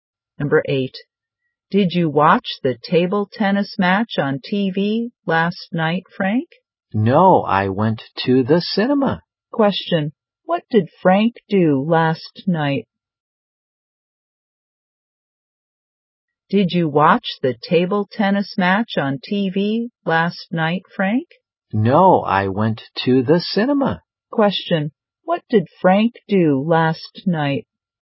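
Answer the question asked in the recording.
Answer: He went to the cinema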